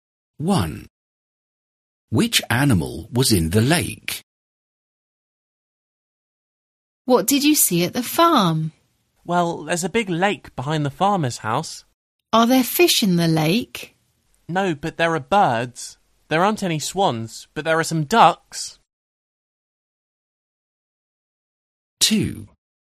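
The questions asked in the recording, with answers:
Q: Which animal was in the lake?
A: ducks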